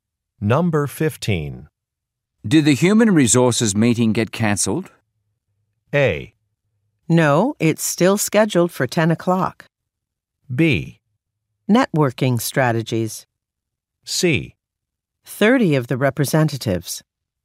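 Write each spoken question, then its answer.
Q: Did the human resources meeting get cancelled?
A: A: No, it's still scheduled for 10 o'clock.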